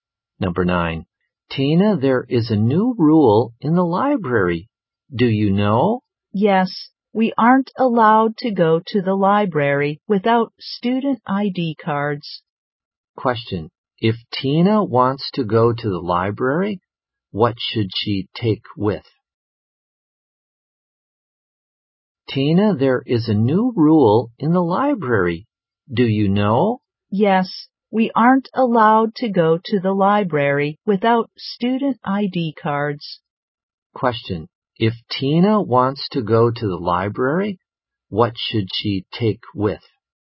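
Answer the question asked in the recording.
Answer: Her student ID card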